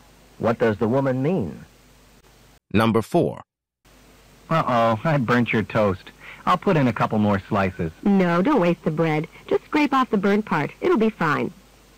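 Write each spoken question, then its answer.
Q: What does the woman mean?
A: She'll eat the toast after scraping off the burnt part.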